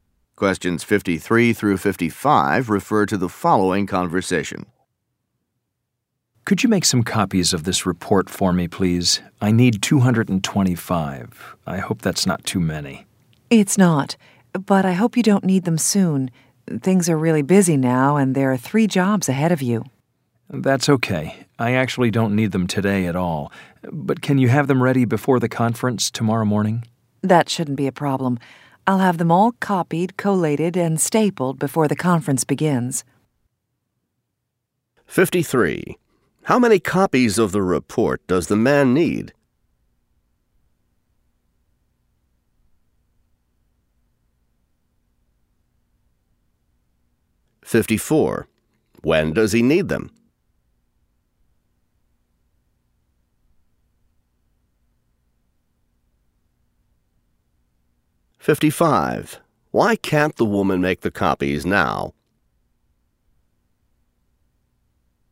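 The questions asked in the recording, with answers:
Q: How many copies of the report does the man need?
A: 225

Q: When does he need them?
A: Before the conference tomorrow morning

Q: Why can't the woman make the copies now?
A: She is busy; there are 3 jobs ahead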